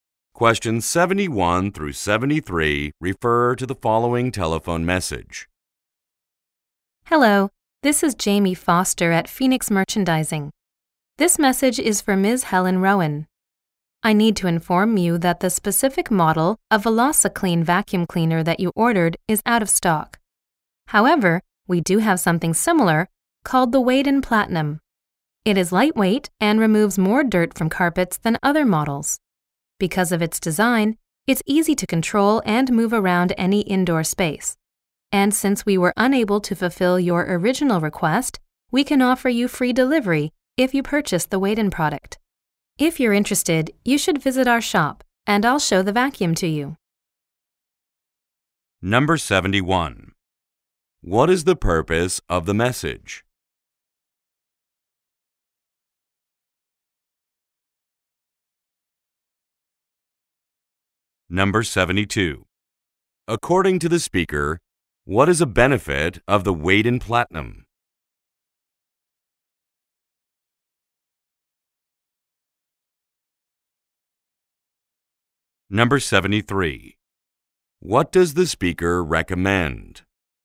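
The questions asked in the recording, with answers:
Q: What is the purpose of the message?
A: To say the ordered vacuum is out of stock

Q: According to the speaker, what is a benefit of the Waden Platinum?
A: It is lightweight and removes more dirt

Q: What does the speaker recommend?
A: Visiting the shop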